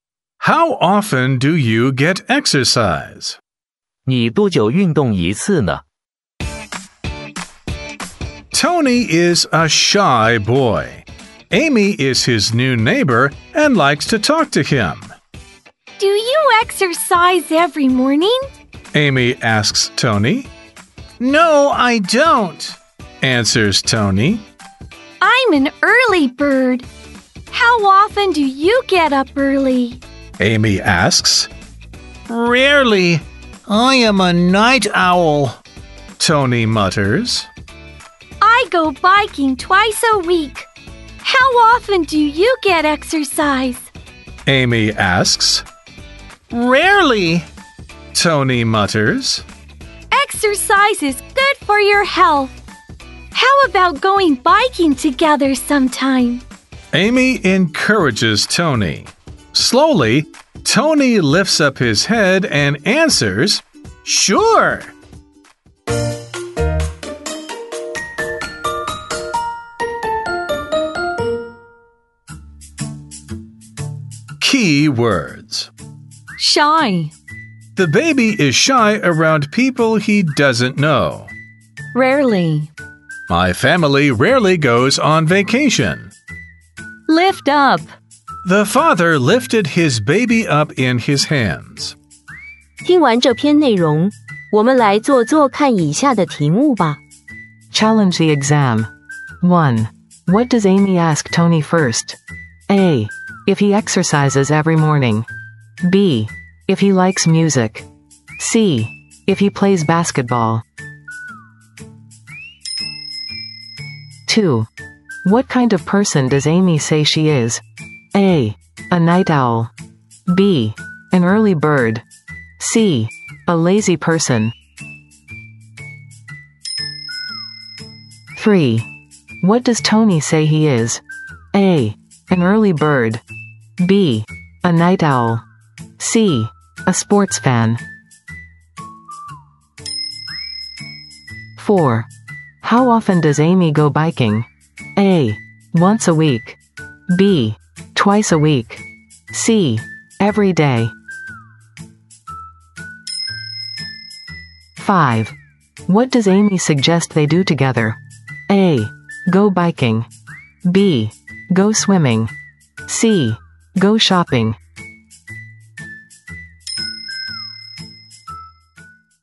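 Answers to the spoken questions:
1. A: If he exercises every morning.
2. B: An early bird.
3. B: A night owl.
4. B: Twice a week.
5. A: Go biking.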